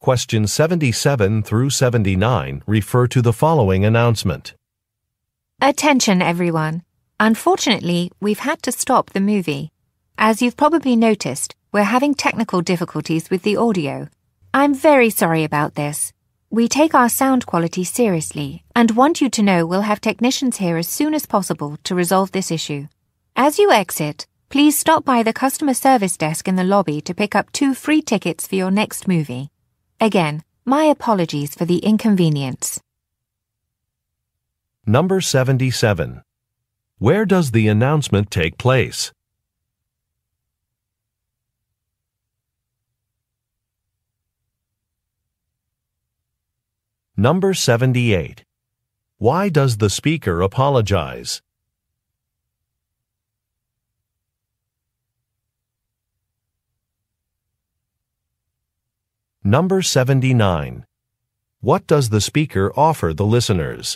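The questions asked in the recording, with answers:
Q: Where does the announcement take place?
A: At a movie theater

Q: Why does the speaker apologize?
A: There are technical problems with the audio

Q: What does the speaker offer the listeners?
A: Two free movie tickets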